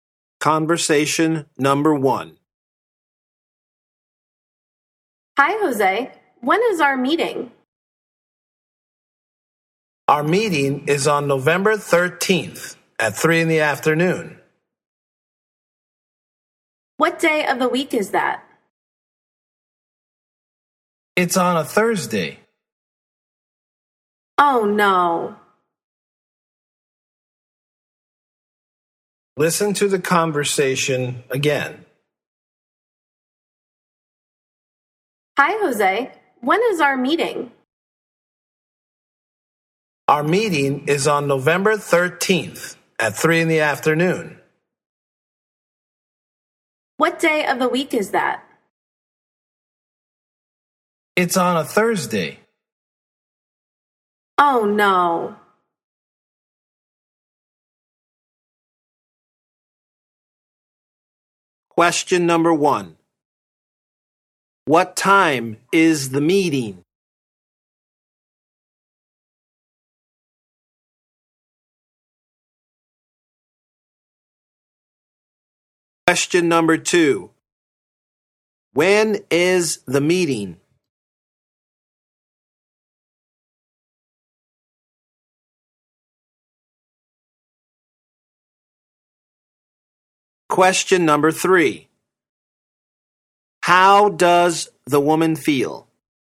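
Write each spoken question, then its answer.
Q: What time is the meeting?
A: At 3 in the afternoon

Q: When is the meeting?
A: On November 13th, a Thursday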